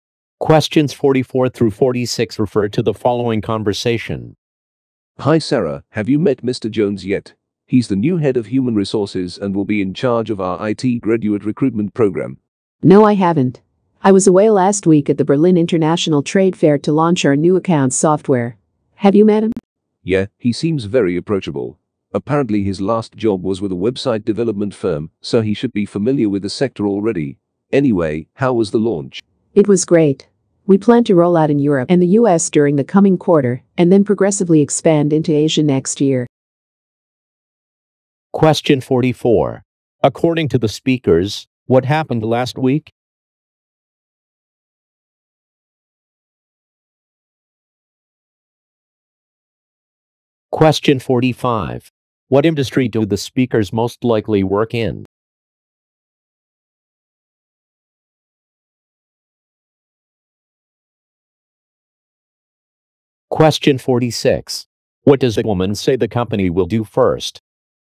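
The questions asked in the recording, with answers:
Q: According to the speakers, what happened last week?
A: A trade fair where new software was launched

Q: What industry do the speakers most likely work in?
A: Software / IT

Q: What does a woman say the company will do first?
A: Roll out in Europe and the US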